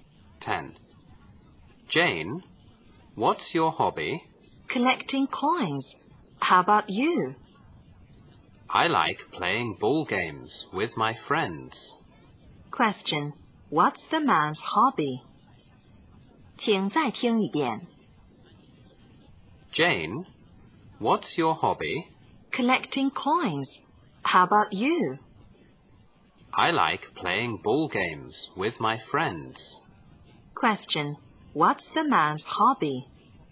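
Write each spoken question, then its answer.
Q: What's the man's hobby?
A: Playing ball games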